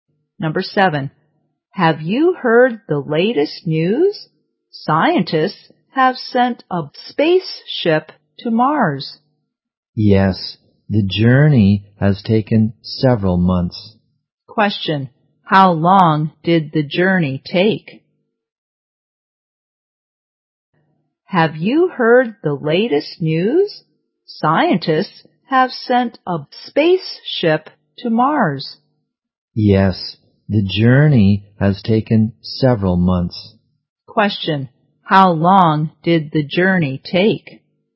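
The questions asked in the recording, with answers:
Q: how long did the journey take?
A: Several months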